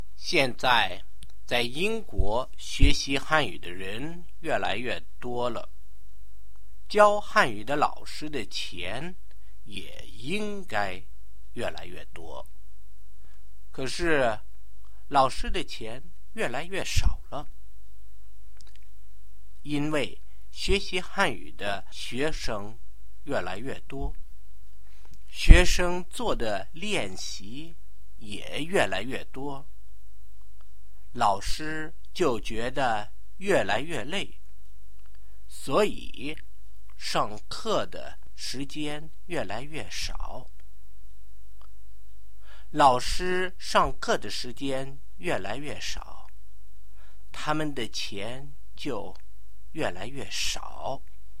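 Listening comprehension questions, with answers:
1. Should Chinese language teachers get more money? Why?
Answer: Yes, because more and more people in Britain are learning Chinese.

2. Explain why Chinese language teachers are getting poorer.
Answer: More students do more exercises, so teachers get more tired and teach fewer class hours, which means they earn less.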